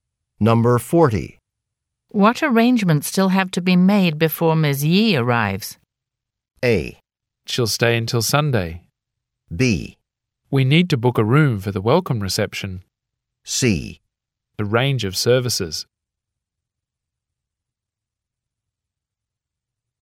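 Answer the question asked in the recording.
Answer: B: We need to book a room for the welcome reception.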